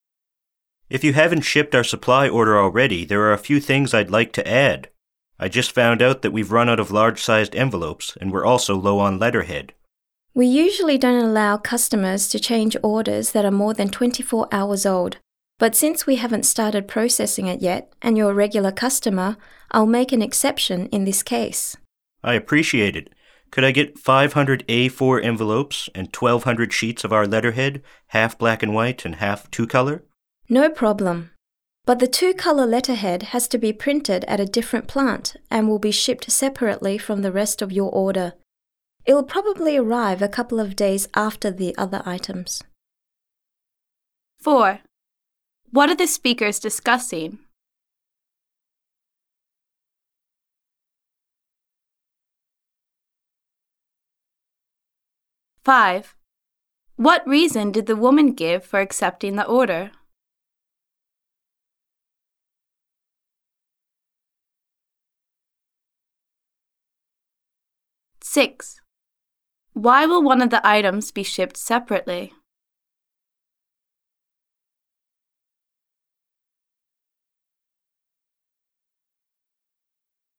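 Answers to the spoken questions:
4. Adding items to a supply order
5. Processing hasn't started yet and he is a regular customer
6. The two-color letterhead must be printed at a different plant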